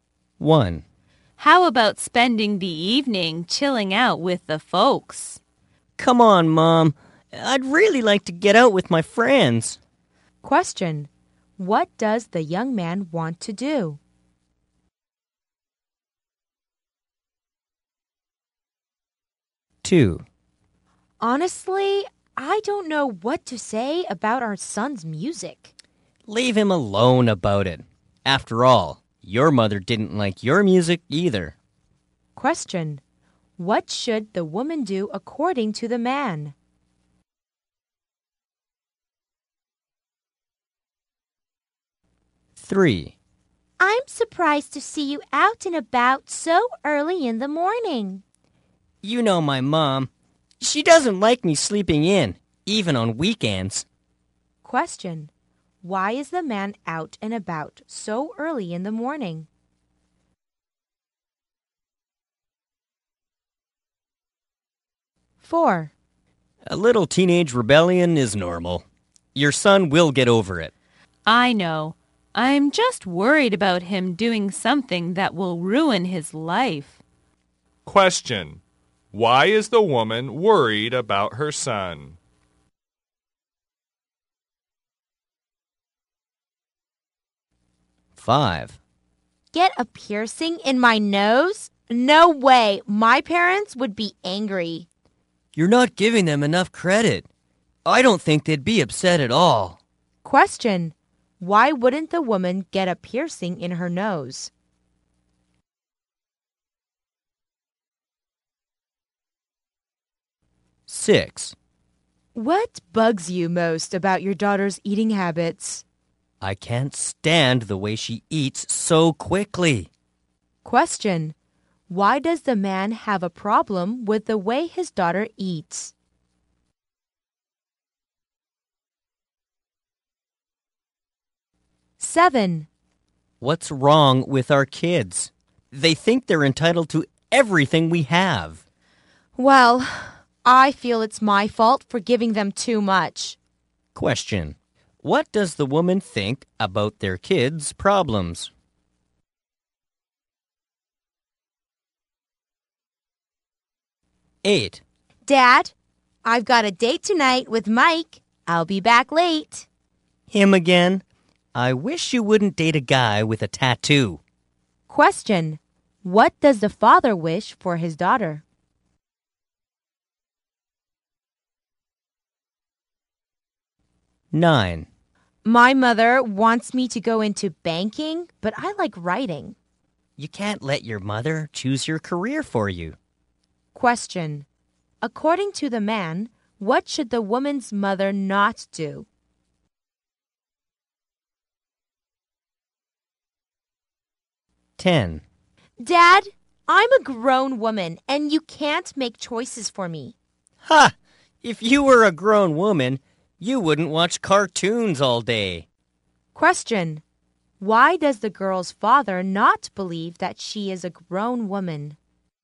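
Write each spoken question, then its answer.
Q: What does the young man want to do?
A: Go out with his friends.

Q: What should the woman do according to the man?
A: Leave their son alone about his music.

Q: Why is the man out and about so early in the morning?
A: His mom doesn't like him sleeping in, even on weekends.

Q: Why is the woman worried about her son?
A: She fears he'll do something that will ruin his life.

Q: Why wouldn't the woman get a piercing in her nose?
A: Her parents would be angry.

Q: Why does the man have a problem with the way his daughter eats?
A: She eats too quickly.

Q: What does the woman think about their kids' problems?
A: It's her fault for giving them too much.

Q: What does the father wish for his daughter?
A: That she wouldn't date a guy with a tattoo.

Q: According to the man, what should the woman's mother not do?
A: Choose the woman's career for her.

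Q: Why does the girl's father not believe that she is a grown woman?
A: She watches cartoons all day.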